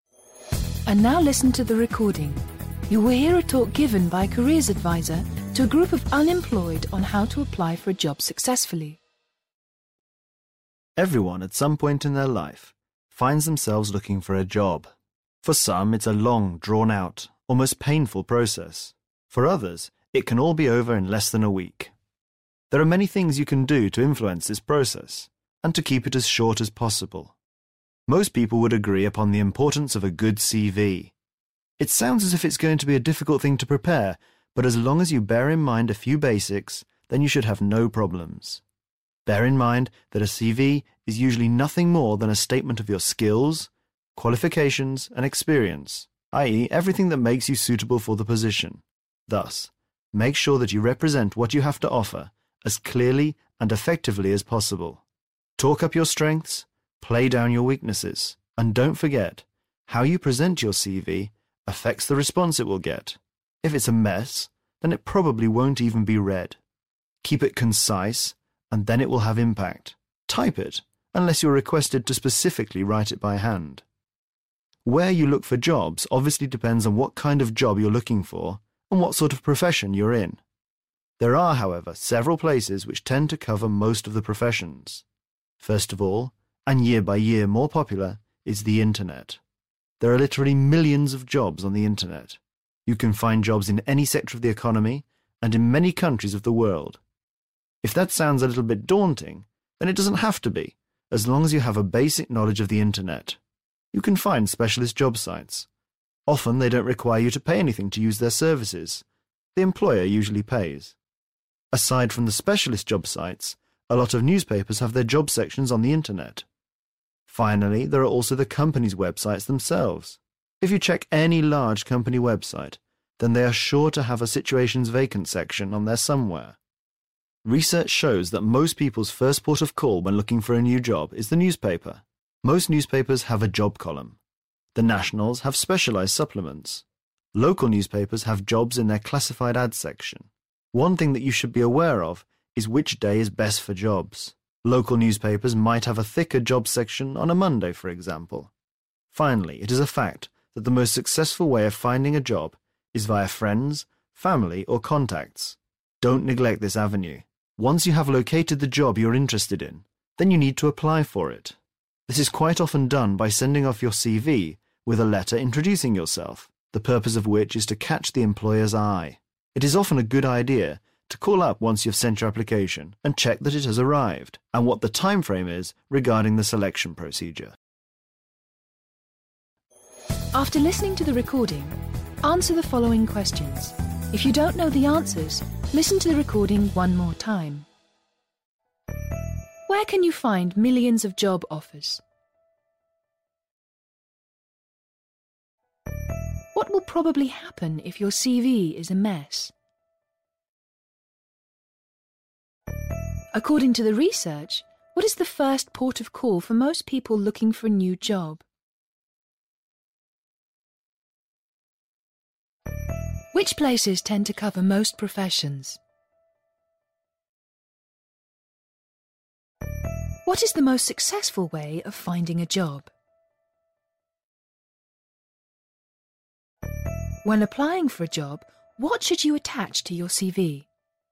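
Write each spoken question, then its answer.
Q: Where can you find millions of job offers?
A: On the internet

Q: What will probably happen if your CV is a mess?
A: It probably won't even be read

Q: According to the research, what is the first port of call for most people looking for a new job?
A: The newspaper

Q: What is the most successful way of finding a job?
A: Via friends, family or contacts

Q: When applying for a job, what should you attach to your CV?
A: A letter introducing yourself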